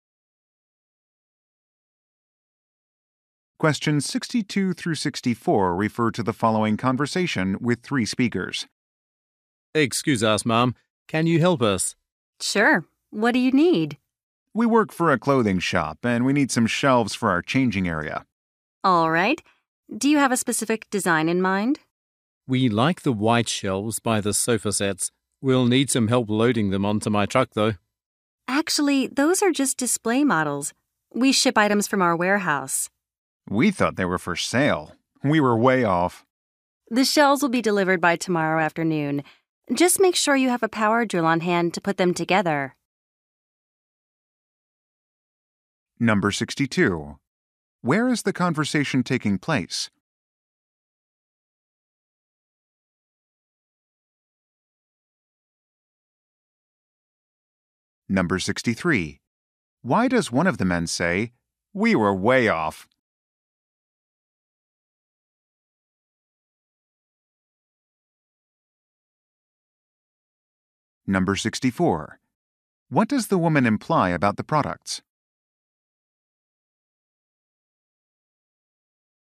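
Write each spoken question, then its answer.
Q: Where is the conversation taking place?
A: In a furniture store

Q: Why does one of the men say, "We were way off"?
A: They wrongly thought the display models were for sale

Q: What does the woman imply about the products?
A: They have to be put together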